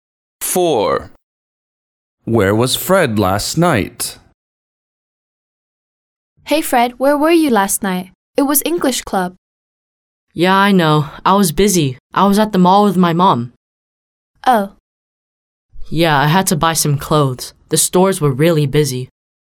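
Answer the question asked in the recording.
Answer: At the mall with his mom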